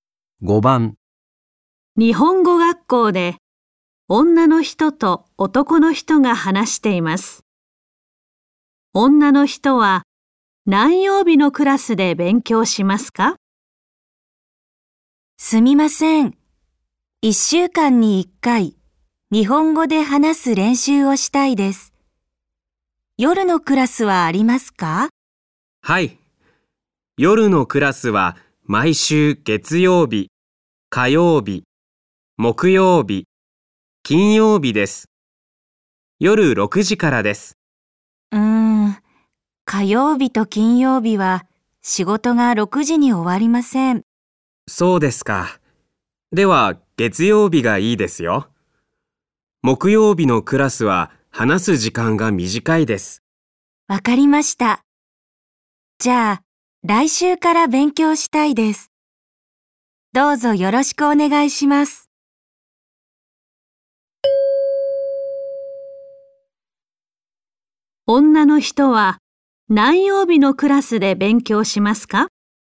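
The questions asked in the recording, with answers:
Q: 女の人は何曜日のクラスで勉強しますか?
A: 月曜日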